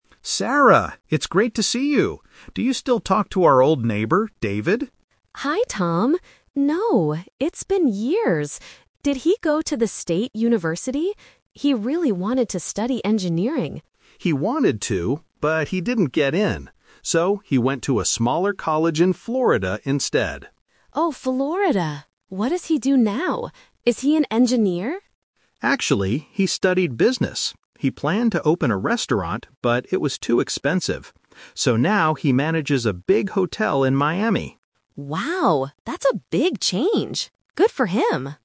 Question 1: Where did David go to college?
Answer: At a college in Florida.

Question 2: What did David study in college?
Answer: Business.

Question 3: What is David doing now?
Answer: He is managing a large hotel.

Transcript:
Tom: Sarah! It's great to see you. Do you still talk to our old neighbor, David?
Sarah: Hi Tom! No, it's been years. Did he go to the state university? He really wanted to study engineering.
Tom: He wanted to, but he didn't get in. So, he went to a smaller college in Florida instead.
Sarah: Oh, Florida! What does he do now? Is he an engineer?
Tom: Actually, he studied business. He planned to open a restaurant, but it was too expensive. So now he manages a big hotel in Miami.